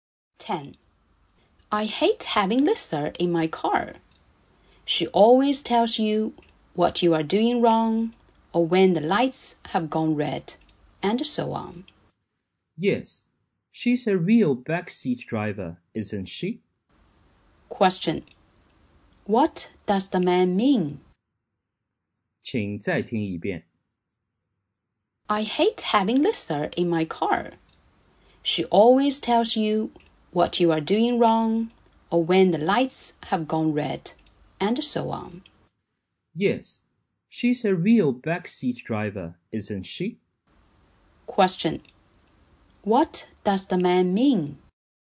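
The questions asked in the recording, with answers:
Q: What does the man mean?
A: Lisa always gives the driver unwanted advice.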